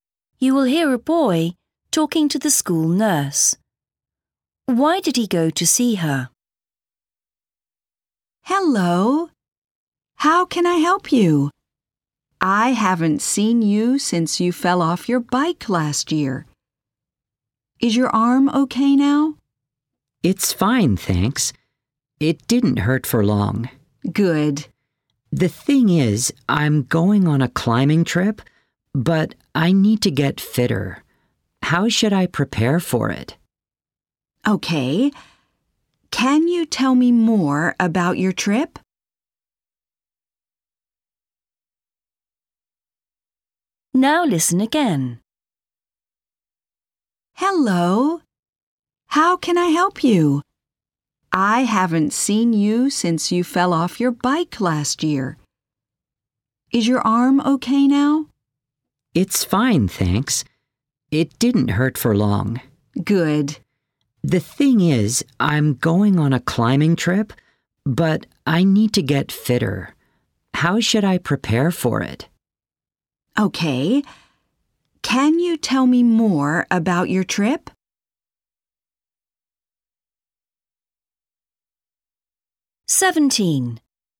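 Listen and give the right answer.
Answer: To get advice on getting fit for a climbing trip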